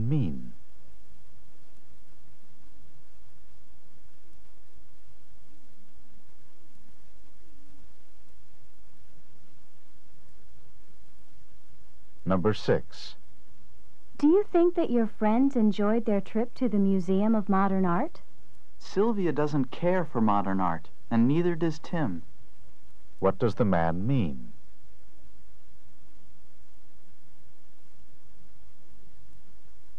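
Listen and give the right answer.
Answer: Neither Sylvia nor Tim likes modern art, so they probably didn't enjoy it.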